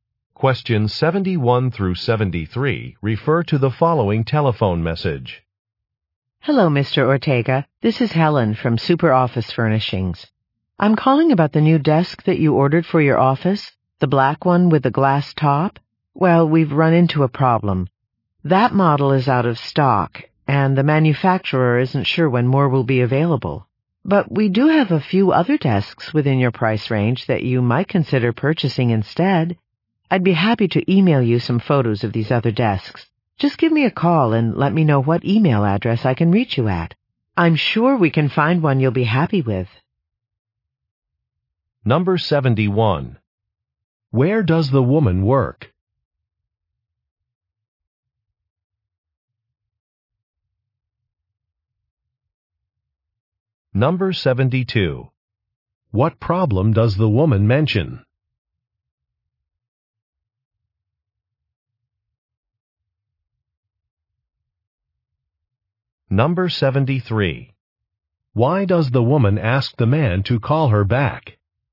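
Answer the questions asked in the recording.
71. At a furniture store (Super Office Furnishings)
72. The desk he ordered is out of stock
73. To give his email address so she can send photos of other desks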